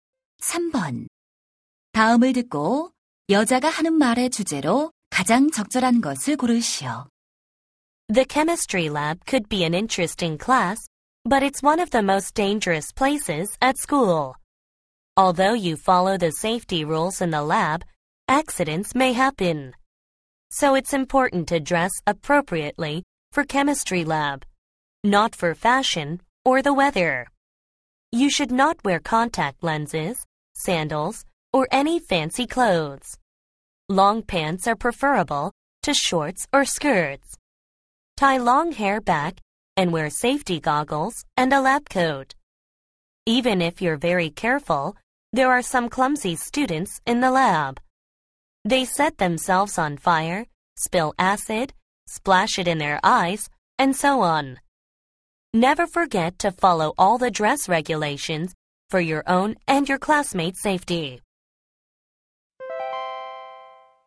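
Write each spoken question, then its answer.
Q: 다음을 듣고 여자가 하는 말의 주제로 가장 적절한 것을 고르시오.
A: 화학 실험실에서 안전을 위해 적절한 복장을 갖춰야 한다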